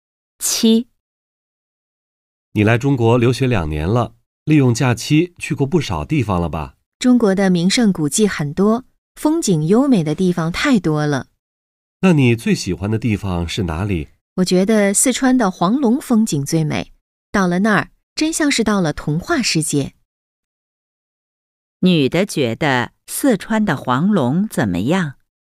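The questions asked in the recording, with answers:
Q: 女的觉得四川的黄龙怎么样?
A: 风景最美,像童话世界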